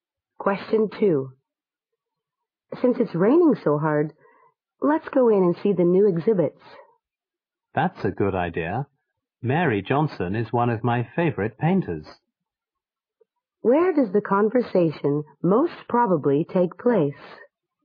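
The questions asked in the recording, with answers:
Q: Where does the conversation most probably take place?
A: Outside an art gallery.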